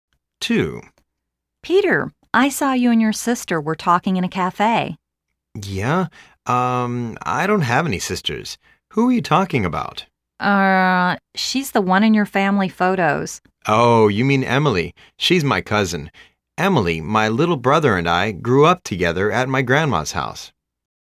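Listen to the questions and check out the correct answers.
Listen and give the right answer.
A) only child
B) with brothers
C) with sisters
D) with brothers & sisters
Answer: B) with brothers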